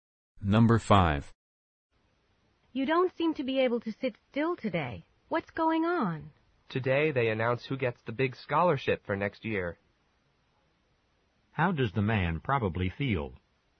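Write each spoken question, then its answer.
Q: How does the man probably feel?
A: Nervous and anxious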